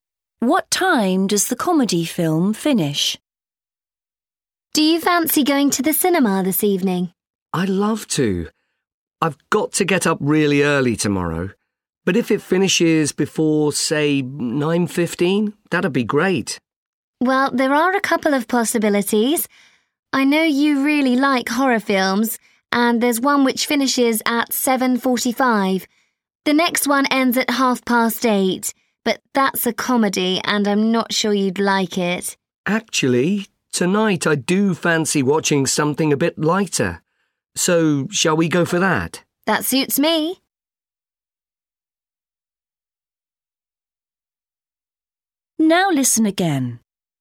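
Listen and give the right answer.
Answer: 8:30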